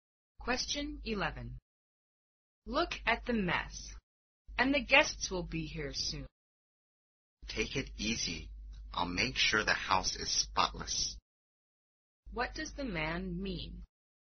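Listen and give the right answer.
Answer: He will clean the house before the guests arrive.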